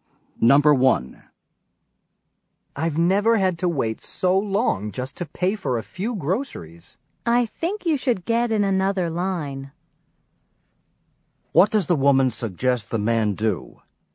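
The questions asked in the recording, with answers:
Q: What does the woman suggest the man do?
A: Get in another line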